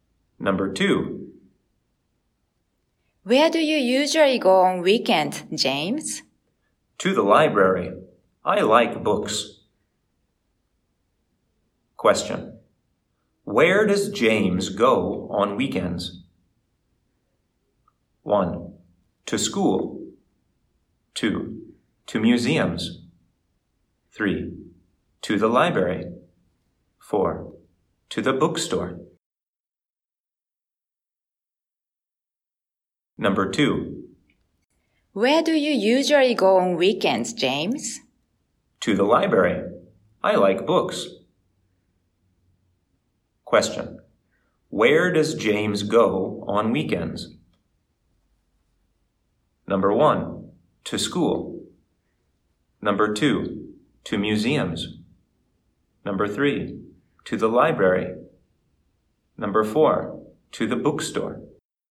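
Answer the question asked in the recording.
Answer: 3: To the library.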